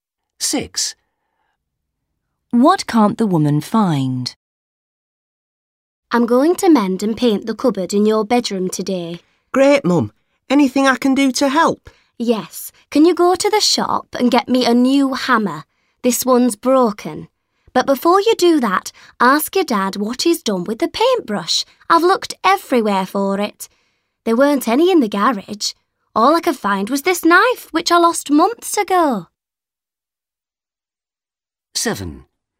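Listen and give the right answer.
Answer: The paintbrush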